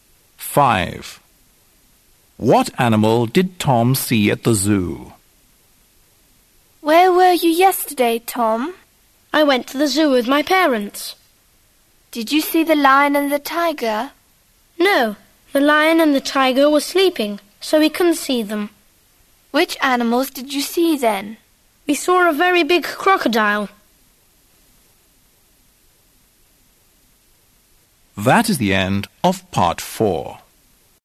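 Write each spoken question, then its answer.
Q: What animal did Tom see at the zoo?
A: A crocodile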